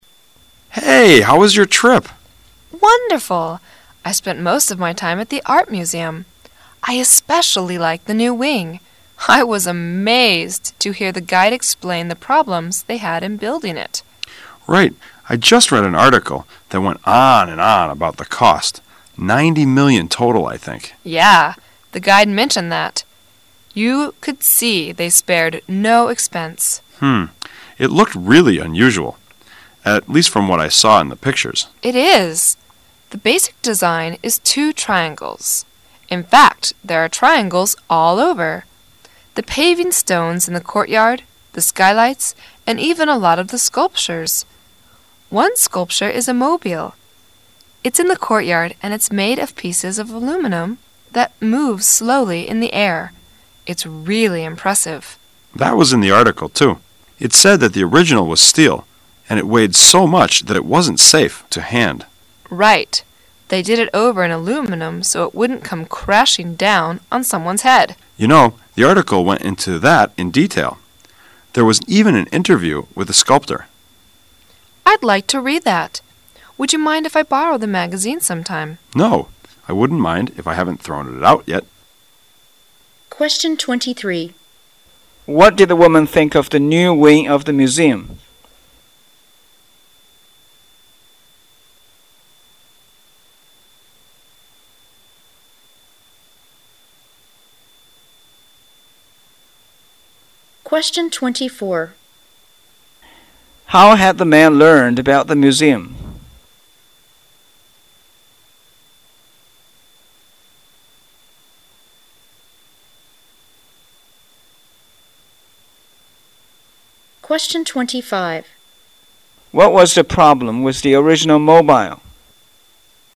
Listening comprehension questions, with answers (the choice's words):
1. How had the man learned about the museum?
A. He took a tour of the city.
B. He read about it.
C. He wrote an article about it.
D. He worked there as a guide.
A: He read about it.

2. What was the problem with the original mobile?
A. It was made of aluminum.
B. It wasn't large enough.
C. It wouldn't move in the wind.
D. It was too heavy to put up.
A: It was too heavy to put up.

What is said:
[解析] 23-25 M: Hey! How was your trip? W: Wonderful! I spent most of my time at the art museum. I especially like the new wing. I was amazed to hear the guide explain the problems they had in building it. M: Right. I just read an article that went on and on about the cost. 90 million total I think. W: Yeah. The guide mentioned that. You could see they spared no expense. It looked really unusal, at least from what I saw in the picture. W: It is. The basic design is two triangles. In fact there are triangles all over. The paving stones in the courtyard, the skylights and even a lot of the sculptures. One sculpture is mobile. It's in the courtyard and it's made of pieces of aluminum that moves slowly in the air. It's really impressive. M: That was in the article too. It said that the original was steel and it weighted so much that it wasn't safe to hand. W: Right. They did it over in aluminum so it wouldn't come crashing down on someone's head. M: You know the article went into that in detail. There was even an interview with the sculptor. W: I'd like to read that. Would you mind if I borrow the magazine sometime? M: No. I wouldn't mind of I haven't thrown it ont yet. What did the woman think of the new wing of the museum?